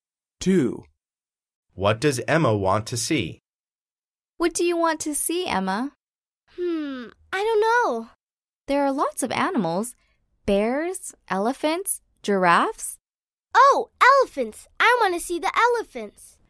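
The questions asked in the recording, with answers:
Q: What does Emma want to see?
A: the elephants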